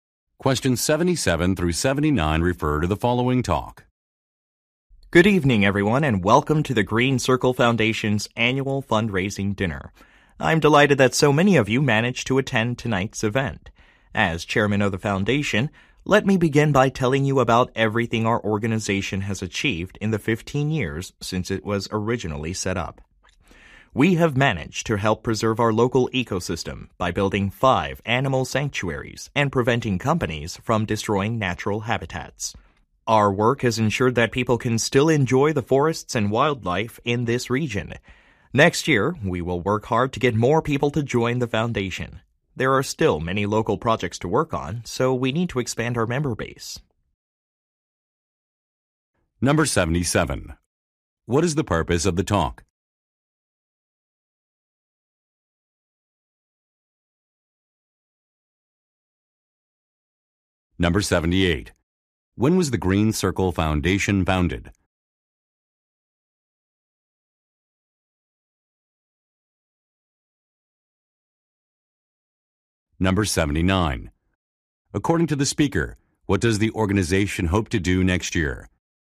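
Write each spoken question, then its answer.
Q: What is the purpose of the talk?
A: To describe the foundation's achievements at a fundraising dinner

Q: When was the Green Circle Foundation founded?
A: 15 years ago

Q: According to the speaker, what does the organization hope to do next year?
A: Expand its membership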